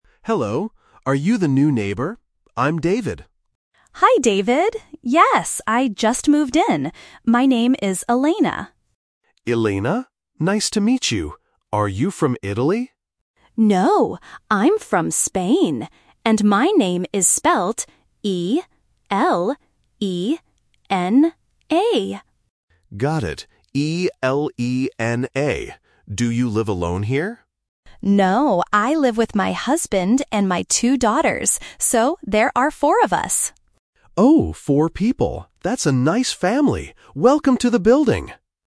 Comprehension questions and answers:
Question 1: How does the woman spell her name?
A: E-L-E-N-A

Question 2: Where is the woman from?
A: Spain

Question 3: How many people are in the woman's family?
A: Four

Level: A1